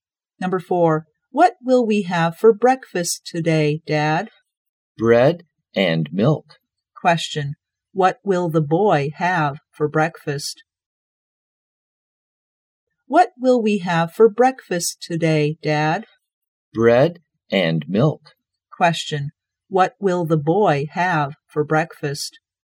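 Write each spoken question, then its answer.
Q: what will the boy have for breakfast?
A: Bread and milk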